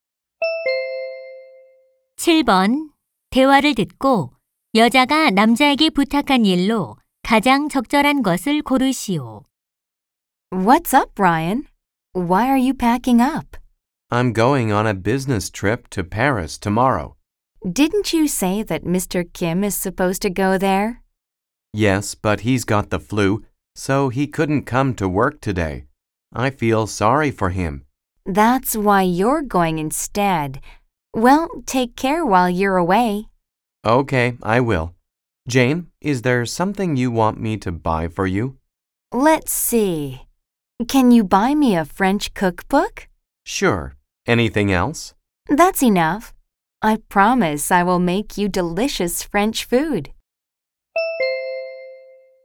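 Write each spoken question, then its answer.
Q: 대화를 듣고 여자가 남자에게 부탁한 일로 가장 적절한 것을 고르시오.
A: 프랑스 요리책 사 오기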